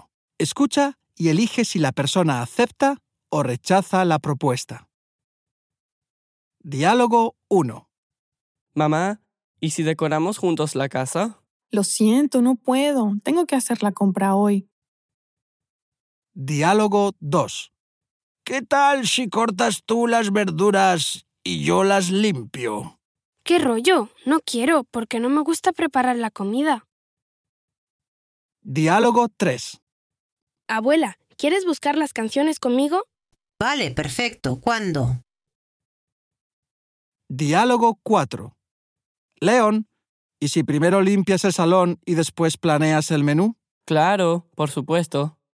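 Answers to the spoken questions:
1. rechaza
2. rechaza
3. acepta
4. acepta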